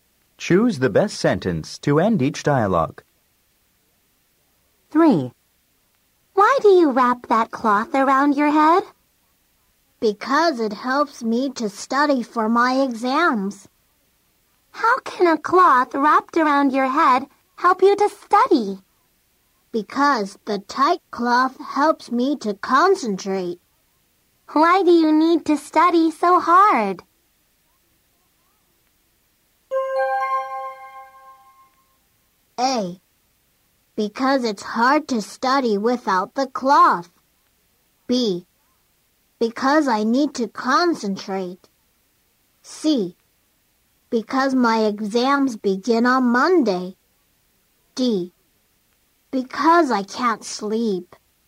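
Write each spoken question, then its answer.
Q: Why do you need to study so hard?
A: C: Because my exams begin on Monday.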